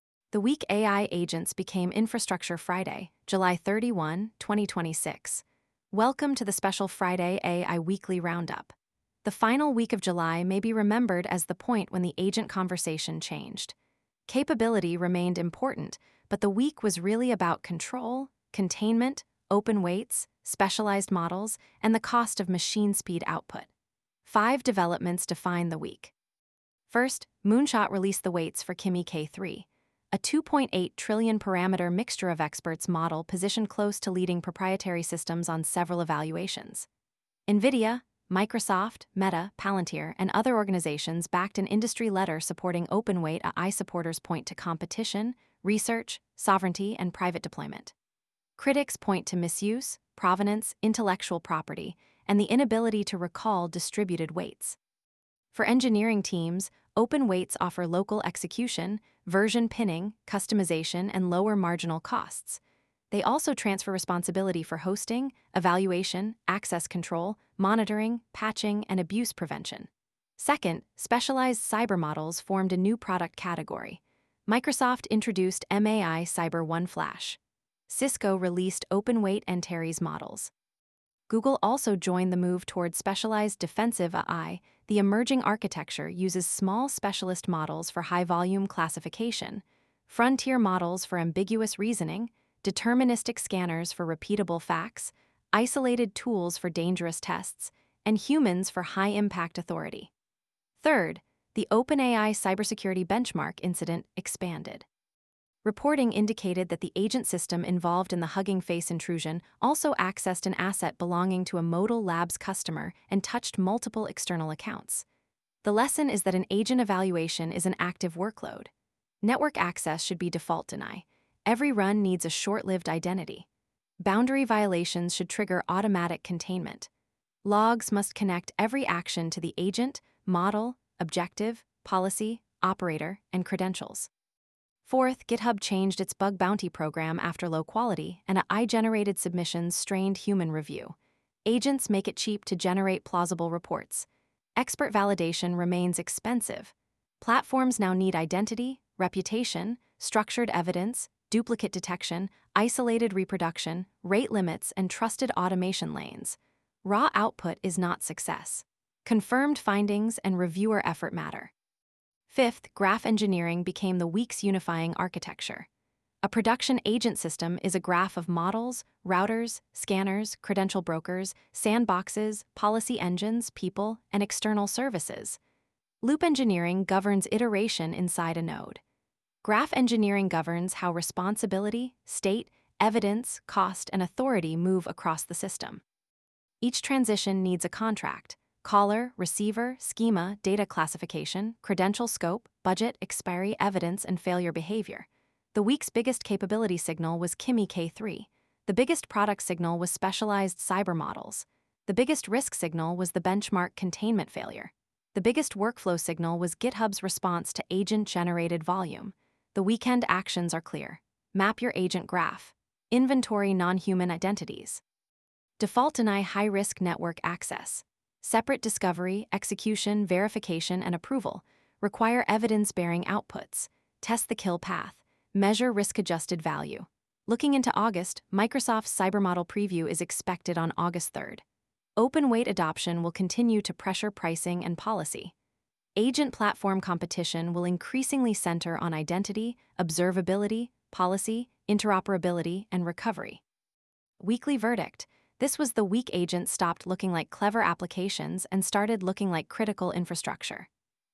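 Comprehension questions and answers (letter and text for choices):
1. What made Kimi K3 strategically important this week?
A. Its weights were released, expanding access to a model positioned near proprietary frontier systems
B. It became a closed image-only model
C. It removed all support for coding tasks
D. It could only run through one US provider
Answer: A. Its weights were released, expanding access to a model positioned near proprietary frontier systems

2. What architecture is emerging for AI security work?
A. Specialist models, frontier escalation, deterministic checks, isolated execution, and human gates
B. One unrestricted model controlling every step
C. No verification or policy layer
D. Only manual scanning with no automation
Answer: A. Specialist models, frontier escalation, deterministic checks, isolated execution, and human gates

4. What problem did GitHub's bug-bounty change highlight?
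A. AI can generate submissions faster than experts can validate their quality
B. Security researchers stopped submitting reports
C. All AI-generated reports are critical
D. Duplicate detection is no longer needed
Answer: A. AI can generate submissions faster than experts can validate their quality

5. What does Graph Engineering govern?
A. How state, evidence, authority, identity, and cost move across system nodes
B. Only the wording of a single prompt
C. Only model training data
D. The visual colour of architecture diagrams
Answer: A. How state, evidence, authority, identity, and cost move across system nodes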